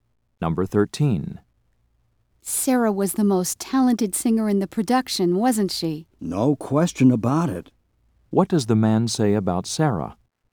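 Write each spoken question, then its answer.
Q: What does the man say about Sarah?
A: She was definitely the most talented singer.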